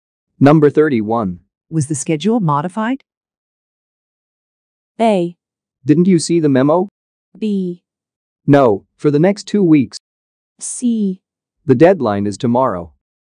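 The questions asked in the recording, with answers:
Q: Was the schedule modified?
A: A: Didn't you see the memo?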